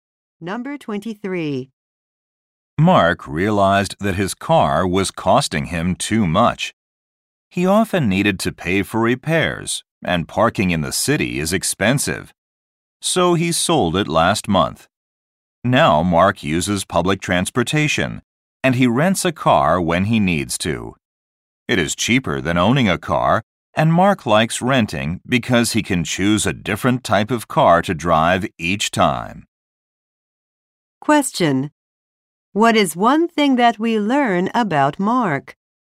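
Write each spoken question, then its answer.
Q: What is one thing that we learn about Mark?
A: He sold his car and now rents cars when needed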